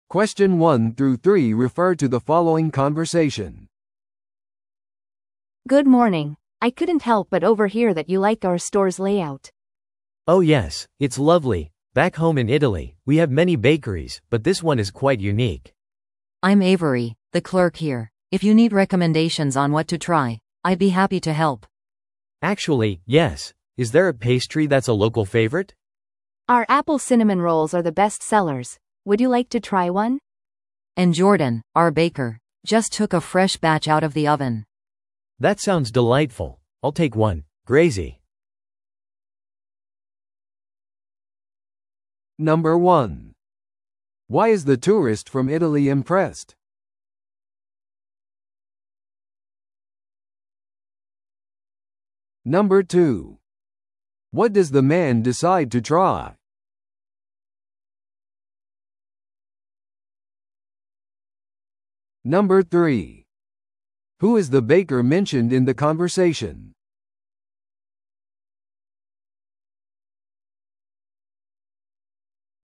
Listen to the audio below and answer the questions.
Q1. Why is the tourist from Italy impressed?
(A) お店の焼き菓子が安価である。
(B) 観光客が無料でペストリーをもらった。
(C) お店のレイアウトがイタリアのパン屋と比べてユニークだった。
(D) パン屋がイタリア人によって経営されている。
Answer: お店のレイアウトがイタリアのパン屋と比べてユニークだった。

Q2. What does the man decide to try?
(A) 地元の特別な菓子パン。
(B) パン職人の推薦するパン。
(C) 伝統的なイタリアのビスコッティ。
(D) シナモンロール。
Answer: シナモンロール。

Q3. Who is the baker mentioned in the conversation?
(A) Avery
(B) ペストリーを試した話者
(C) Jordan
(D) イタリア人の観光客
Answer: Jordan

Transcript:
A: Good morning! I couldn't help but overhear that you like our store's layout.
B: Oh yes, it's lovely. Back home in Italy, we have many bakeries, but this one is quite unique.
C: I'm Avery, the clerk here. If you need recommendations on what to try, I'd be happy to help!
B: Actually, yes. Is there a pastry that's a local favorite?
A: Our apple cinnamon rolls are the best-sellers. Would you like to try one?
C: And Jordan, our baker, just took a fresh batch out of the oven!
B: That sounds delightful. I'll take one. Grazie!

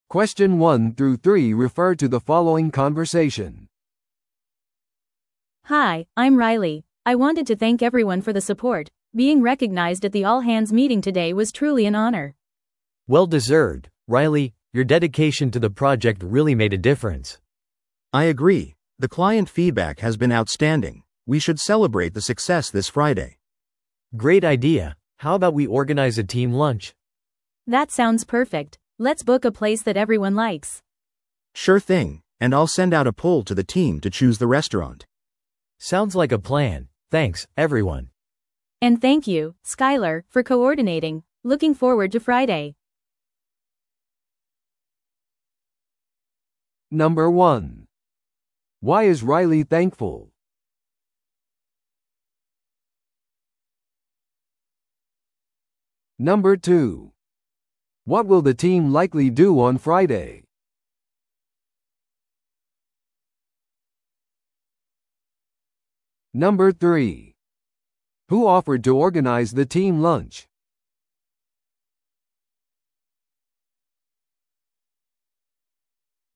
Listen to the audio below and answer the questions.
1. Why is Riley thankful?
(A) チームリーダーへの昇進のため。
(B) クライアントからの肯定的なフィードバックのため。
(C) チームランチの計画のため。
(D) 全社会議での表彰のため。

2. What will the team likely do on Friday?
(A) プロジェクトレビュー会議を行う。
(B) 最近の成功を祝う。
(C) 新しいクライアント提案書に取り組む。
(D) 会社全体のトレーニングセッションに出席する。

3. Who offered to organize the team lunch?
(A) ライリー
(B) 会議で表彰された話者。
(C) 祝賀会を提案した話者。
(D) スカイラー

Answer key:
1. 全社会議での表彰のため。
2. 最近の成功を祝う。
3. スカイラー

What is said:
A: Hi, I'm Riley. I wanted to thank everyone for the support. Being recognized at the all-hands meeting today was truly an honor.
B: Well deserved, Riley! Your dedication to the project really made a difference.
C: I agree, the client feedback has been outstanding. We should celebrate the success this Friday!
B: Great idea! How about we organize a team lunch?
A: That sounds perfect. Let's book a place that everyone likes.
C: Sure thing, and I'll send out a poll to the team to choose the restaurant.
B: Sounds like a plan. Thanks, everyone!
A: And thank you, Skyler, for coordinating. Looking forward to Friday!

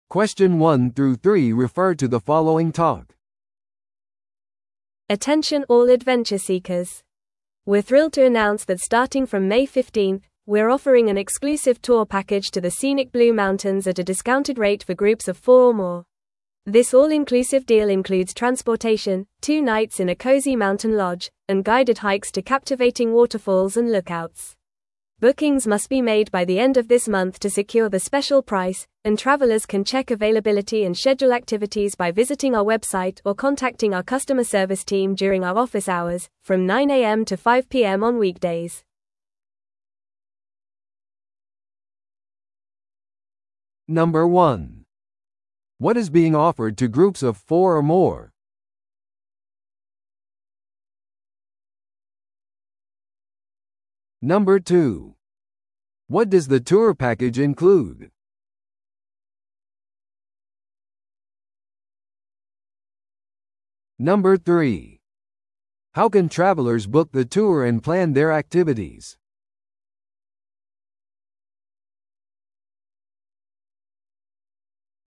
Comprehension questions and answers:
Listen to the audio below and answer the questions.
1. What is being offered to groups of four or more?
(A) 一日市内ツアー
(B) ブルーマウンテンツアーパッケージの割引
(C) 個人の山登りレッスン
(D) 無制限の旅行パス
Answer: ブルーマウンテンツアーパッケージの割引

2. What does the tour package include?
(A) ボートクルーズとピクニック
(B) 劇場チケットとディナークーポン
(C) 交通機関と山小屋宿泊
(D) ワイナリーツアーとワインテイスティングセッション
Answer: 交通機関と山小屋宿泊

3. How can travelers book the tour and plan their activities?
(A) 地元の観光案内所を訪れることによって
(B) 自動予約キオスクを通じて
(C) 代理店のソーシャルメディアページを使用して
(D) 代理店のウェブサイトを利用するかカスタマーサービスに連絡することによって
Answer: 代理店のウェブサイトを利用するかカスタマーサービスに連絡することによって

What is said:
Attention all adventure seekers! We're thrilled to announce that starting from May 15th, we're offering an exclusive tour package to the scenic Blue Mountains at a discounted rate for groups of four or more. This all-inclusive deal includes transportation, two nights in a cozy mountain lodge, and guided hikes to captivating waterfalls and lookouts. Bookings must be made by the end of this month to secure the special price, and travelers can check availability and schedule activities by visiting our website or contacting our customer service team during our office hours, from 9am to 5pm on weekdays.

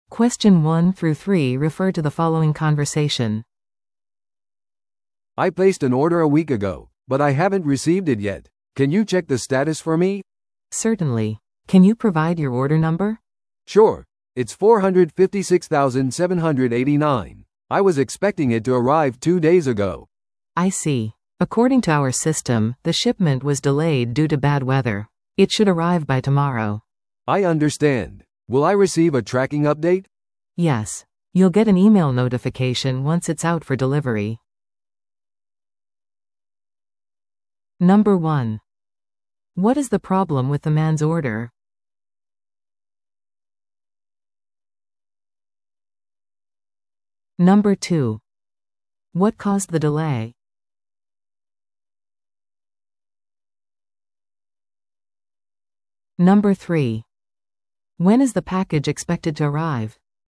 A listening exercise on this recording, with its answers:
Listen to the audio below and answer the questions.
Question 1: What is the problem with the man's order?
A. 紛失した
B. 遅れている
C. 間違った住所に送られた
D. 破損していた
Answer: 遅れている

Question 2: What caused the delay?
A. 倉庫の問題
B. 支払いの問題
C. 悪天候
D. 間違った注文をした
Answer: 悪天候

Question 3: When is the package expected to arrive?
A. 今日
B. 明日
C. 来週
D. 不明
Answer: 明日

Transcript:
A: "I placed an order a week ago, but I haven't received it yet. Can you check the status for me?"
B: "Certainly. Can you provide your order number?"
A: "Sure, it's 456789. I was expecting it to arrive two days ago."
B: "I see. According to our system, the shipment was delayed due to bad weather. It should arrive by tomorrow."
A: "I understand. Will I receive a tracking update?"
B: "Yes. You'll get an email notification once it's out for delivery."

